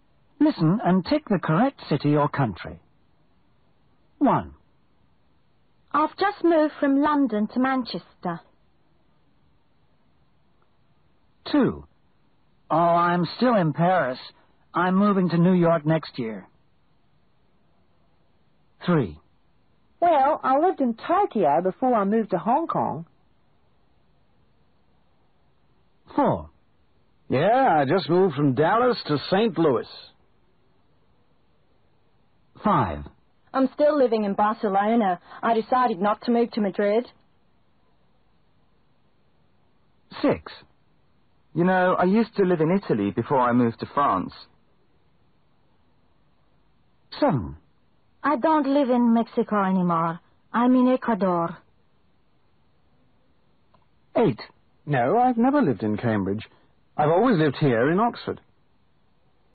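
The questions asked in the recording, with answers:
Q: Where are these people living now?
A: Manchester

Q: Where are these people living now?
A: Paris

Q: Where are these people living now?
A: Hong Kong

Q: Where are these people living now?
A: St. Louis

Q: Where are these people living now?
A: Barcelona

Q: Where are these people living now?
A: France

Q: Where are these people living now?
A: Ecuador

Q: Where are these people living now?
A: Oxford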